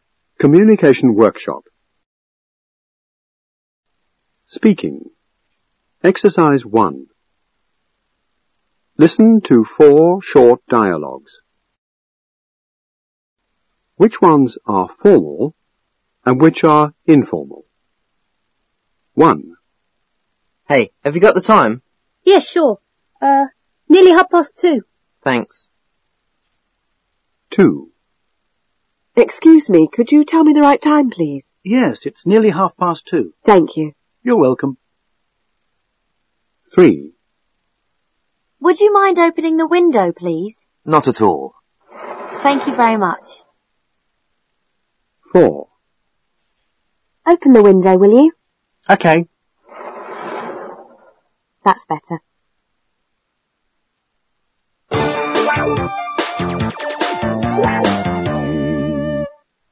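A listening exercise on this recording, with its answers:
1. Now listen to four short dialogues.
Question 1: Which ones are formal and which are informal?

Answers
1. Dialogues 2 and 3 are formal; dialogues 1 and 4 are informal.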